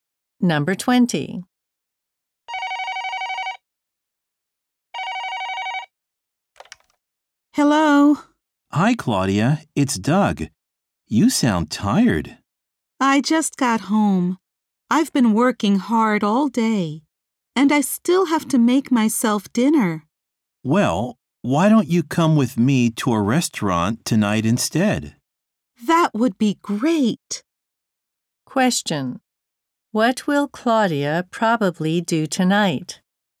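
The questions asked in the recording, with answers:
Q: What will Claudia probably do tonight?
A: Go to a restaurant with Doug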